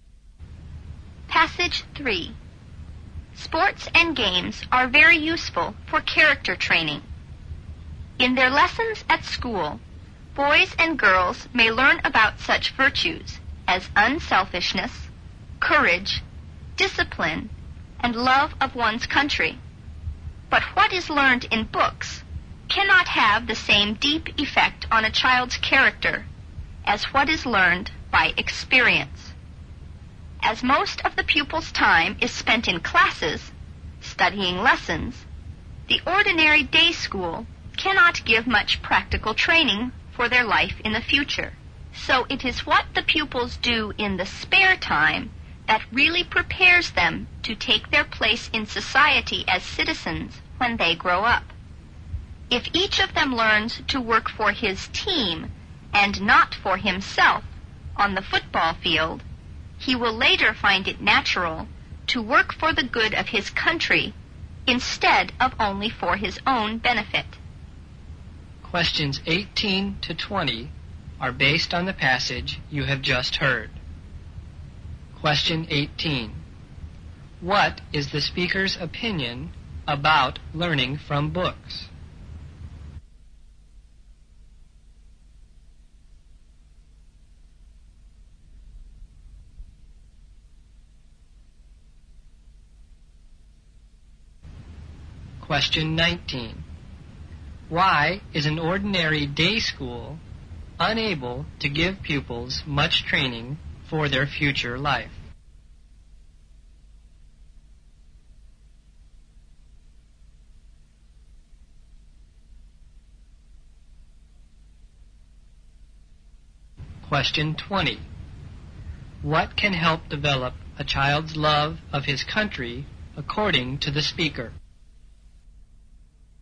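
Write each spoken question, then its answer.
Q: What is the speaker's opinion about learning from books?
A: It has less deep effect on character than learning by experience

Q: Why is an ordinary day school unable to give pupils much training for their future life?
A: Most of the pupils' time is spent in classes studying lessons

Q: What can help develop a child's love of his country according to the speaker?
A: Playing team sports, working for the team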